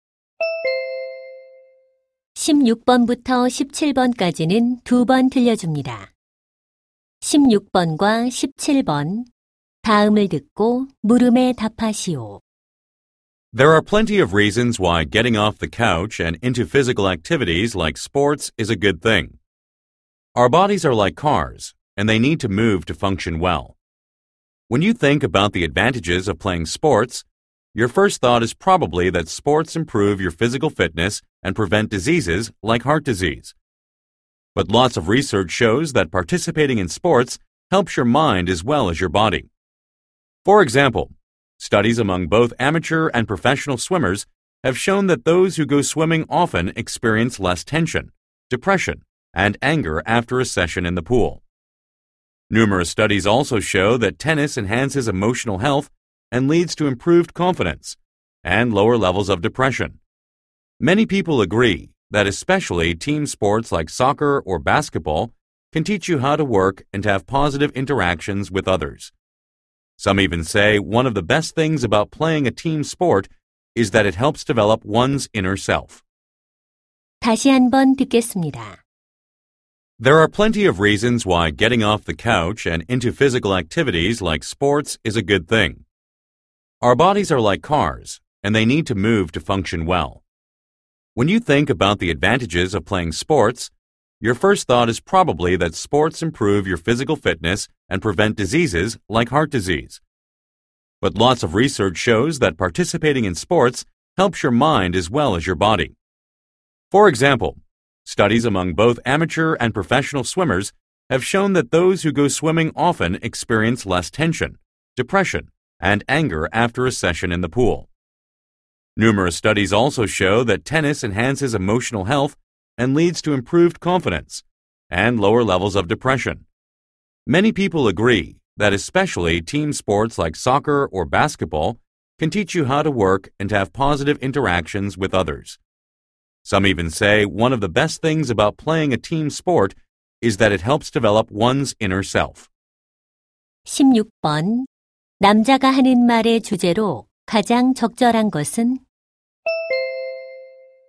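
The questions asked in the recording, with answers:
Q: 남자가 하는 말의 주제로 가장 적절한 것은?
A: 스포츠가 정신 건강에 주는 이점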